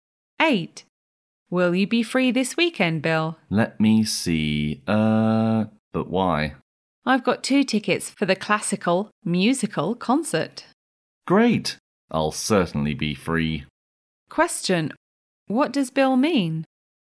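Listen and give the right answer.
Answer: He will be free and will go to the concert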